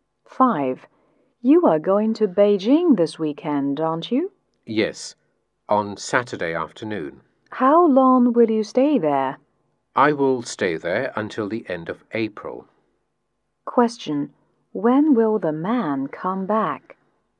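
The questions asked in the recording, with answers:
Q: Question: When will the man come back?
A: At the end of April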